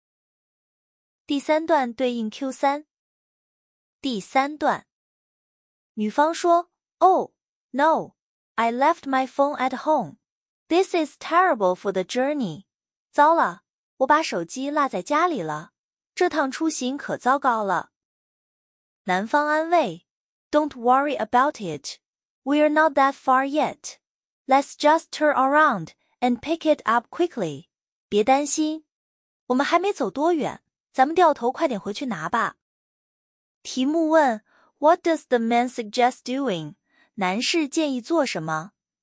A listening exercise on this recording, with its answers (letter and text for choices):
第一节 听 5 段短对话,每段读两遍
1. What does the man suggest doing?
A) Calling off the trip.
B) Asking someone for help.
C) Going back for the phone.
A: C) Going back for the phone.

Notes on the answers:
turn around and pick it up = 回去拿手机。

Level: 高中